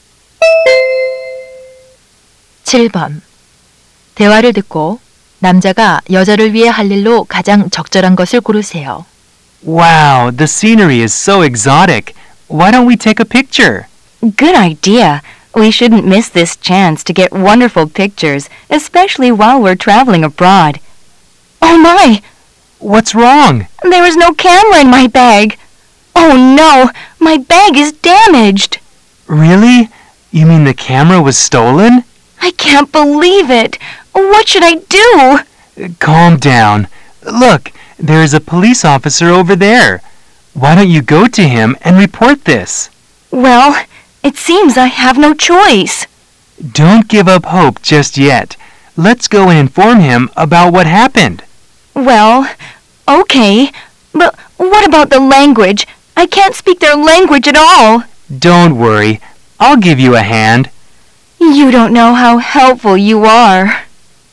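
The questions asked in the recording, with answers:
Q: 대화를 듣고 남자가 여자를 위해 할 일로 가장 적절한 것을 고르세요.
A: 경찰에게 통역해 주기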